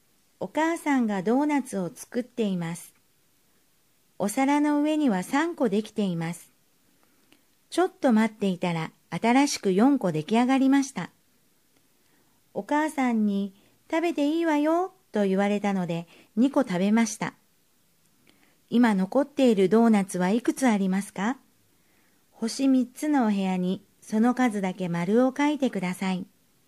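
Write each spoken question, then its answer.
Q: 今残っているドーナツはいくつありますか?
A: 5個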